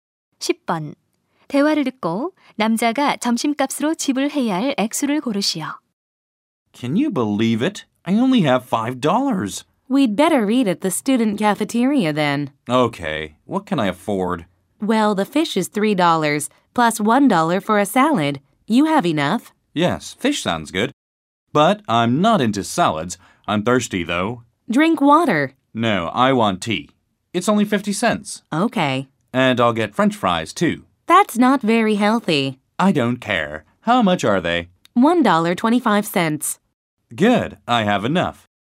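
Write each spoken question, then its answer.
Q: 대화를 듣고 남자가 점심값으로 지불해야 할 액수를 고르시오.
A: $4.75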